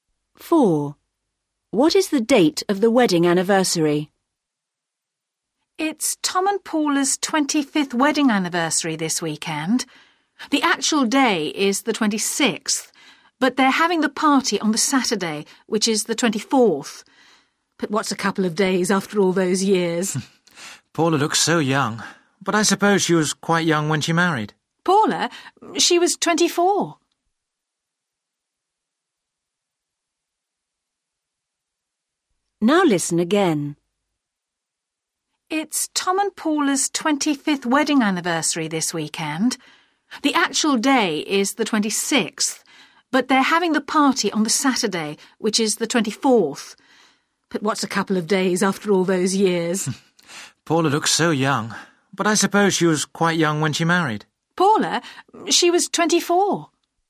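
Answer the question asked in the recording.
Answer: the 26th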